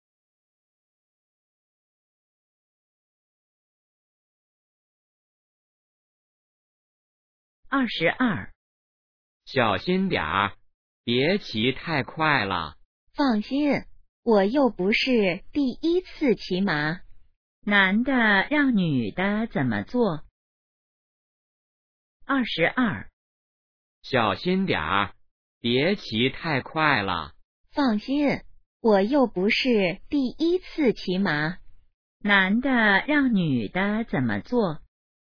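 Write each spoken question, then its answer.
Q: 男的让女的怎么做?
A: 别骑太快,小心点儿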